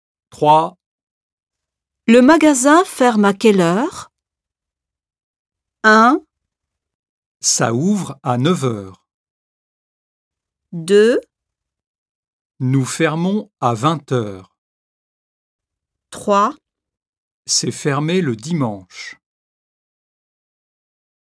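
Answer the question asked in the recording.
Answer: 2: Nous fermons à 20 heures.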